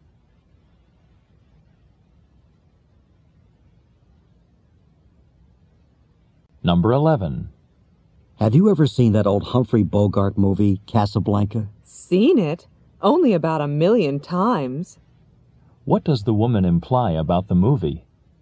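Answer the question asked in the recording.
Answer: She has seen it many times.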